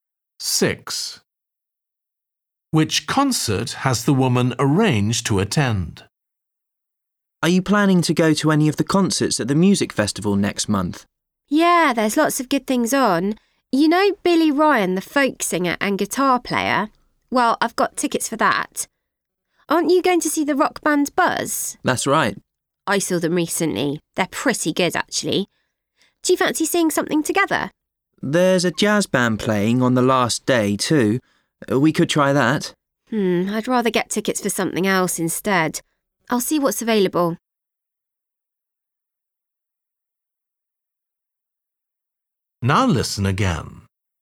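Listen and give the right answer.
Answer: Billy Ryan, the folk singer and guitar player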